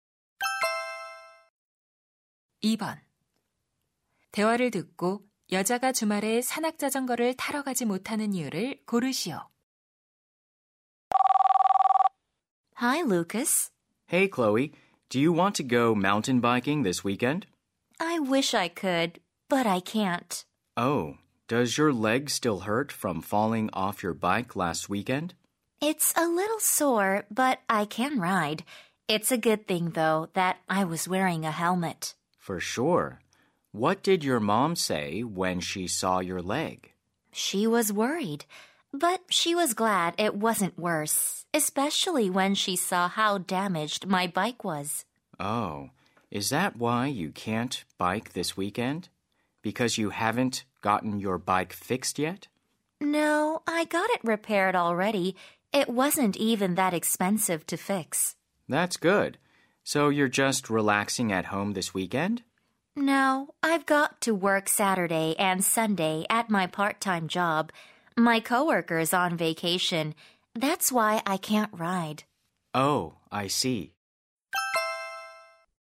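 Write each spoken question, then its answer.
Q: 대화를 듣고 여자가 주말에 산악자전거를 타러 가지 못하는 이유를 고르시오.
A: 주말에 아르바이트를 해야 해서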